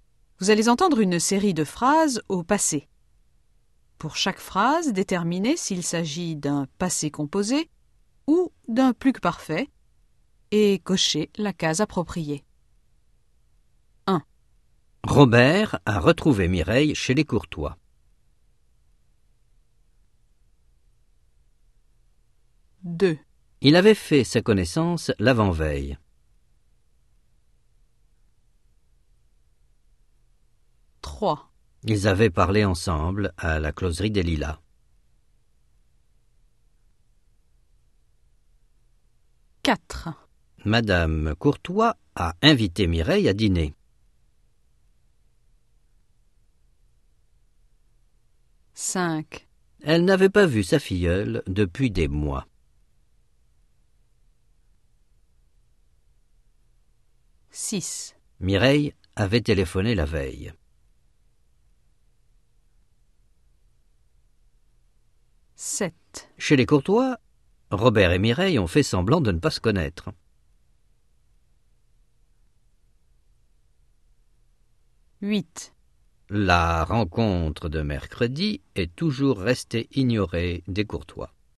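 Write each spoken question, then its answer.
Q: Robert a retrouvé Mireille chez les Courtois.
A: passé composé

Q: Il avait fait sa connaissance l'avant-veille.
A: plus-que-parfait

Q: Ils avaient parlé ensemble à la closerie des Lilas.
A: plus-que-parfait

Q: Madame Courtois a invité Mireille à dîner.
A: passé composé

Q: Elle n'avait pas vu sa filleule depuis des mois.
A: plus-que-parfait

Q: Mireille avait téléphoné la veille.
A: plus-que-parfait

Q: Chez les Courtois, Robert et Mireille ont fait semblant de ne pas se connaître.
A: passé composé

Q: La rencontre de mercredi est toujours restée ignorée des Courtois.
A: passé composé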